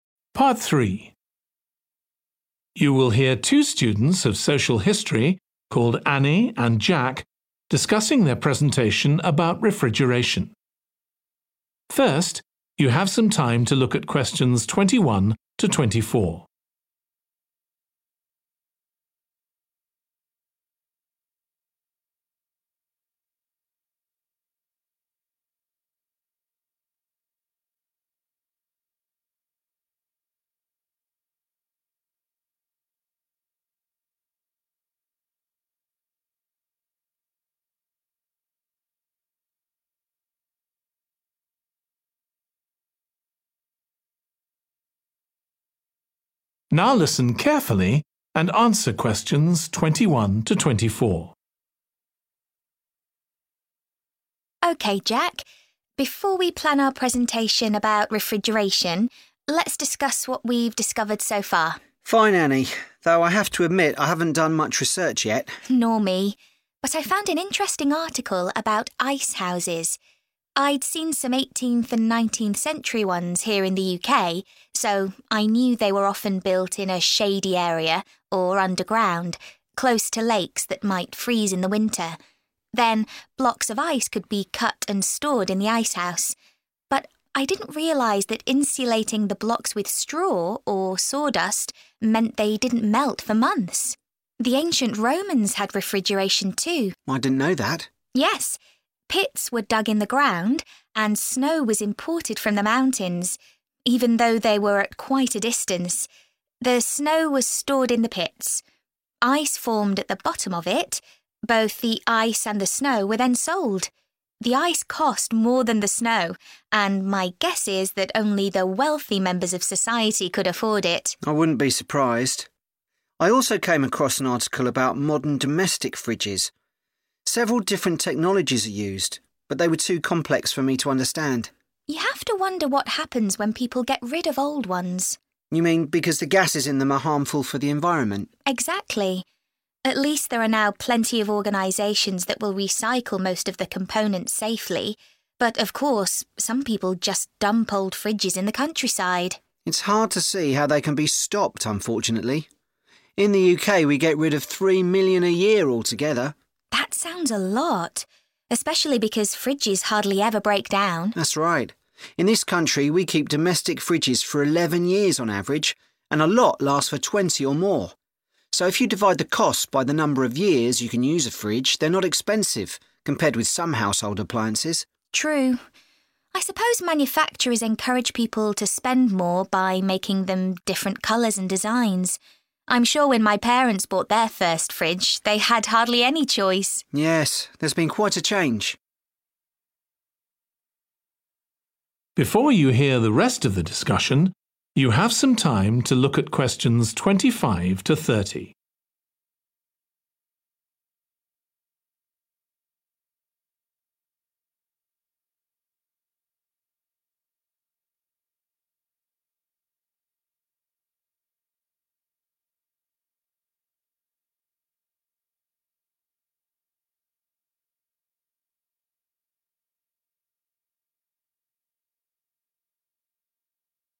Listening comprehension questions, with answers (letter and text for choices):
Choose the correct letter, A, B or C.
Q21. What did Annie discover from reading about icehouses?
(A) why they were first created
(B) how the ice was kept frozen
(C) where they were located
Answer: (B) how the ice was kept frozen

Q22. What point does Annie make about refrigeration in ancient Rome?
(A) It became a commercial business.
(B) It used snow from nearby.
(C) It took a long time to become popular.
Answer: (A) It became a commercial business.

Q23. In connection with modern refrigerator, both Annie and Jack are worried about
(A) the complexity of the technology.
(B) the fact that some are disposed of irresponsibly.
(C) the large number that quickly break down.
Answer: (B) the fact that some are disposed of irresponsibly.

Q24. What do Jack and Annie agree regarding domestic fridges?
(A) They are generally good value for money.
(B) There are plenty of useful variations.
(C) They are more useful than other domestic appliances.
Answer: (A) They are generally good value for money.

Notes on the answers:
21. The correct answer is 'B' because the excerpt mentions that insulating the ice blocks with straw or sawdust prevented them from melting for months, highlighting the method used to keep the ice frozen in the icehouses.
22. The correct answer is A because the excerpt directly supports this point by stating that the ice and snow, which were likely used for refrigeration, were sold. This implies a commercial aspect to refrigeration in ancient Rome.
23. The correct answer is 'B' because the excerpt implies a sense of helplessness in preventing irresponsible disposal of refrigerators, aligning with the concern expressed in choice B about refrigerators being disposed of irresponsibly.
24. The correct answer is 'A' because Jack and Annie believe that when you consider the cost of a fridge over its useful lifespan, they are actually not expensive, making them good value for money as stated in the excerpt.

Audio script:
ANNIE: OK, Jack. Before we plan our presentation about refrigeration, let's discuss what we've discovered so far.
JACK: Fine, Annie. Though I have to admit I haven't done much research yet.
ANNIE: Nor me. But I found an interesting article about icehouses. I'd been some 18th- and 19th-century ones here in the UK, so I knew they were often built in a shady area or underground, close to lakes that might freeze in the winter. Then blocks of ice could be cut and stored in the icehouse. But I didn't realise that insulating the blocks with straw or sawdust meant they didn't melt for months. The ancient Romans had refrigeration, too.
JACK: I didn't know that.
ANNIE: Yes, pits were dug in the ground, and snow was imported from the mountains – even though they were at quite a distance. The snow was stored in the pits. Ice formed at the bottom of it. Both the ice and the snow were then sold. The ice cost more than the snow and my guess is that only the wealthy members of society could afford it.
JACK: I wouldn't be surprised. I also came across an article about modern domestic fridges. Several different technologies are used, but they were too complex for me to understand.
ANNIE: You have to wonder what happens when people get rid of old ones.
JACK: You mean because the gases in them are harmful for the environment?
ANNIE: Exactly. At least these are now plenty of organisations that will recycle most of the components safety, but of course some people just dump old fridges in the countryside.
JACK: It's hard to see how they can be stopped unfortunately. In the UK we get rid of three million a year altogether!
ANNIE: That sounds a lot, especially because fridges hardly ever break down.
JACK: That's right. In this country we keep domestic fridges for 11 years on average, and a lot last for 20 or more. So if you divide the cost by the number of years you can use a fridge, they're not expensive, compared with some household appliances.
ANNIE: True. I suppose manufactures encourage people to spend more by making them different colours and designs. I'm sure when my parents bought their first fridge they had hardly any choice!
JACK: Yes, there's been quite a change.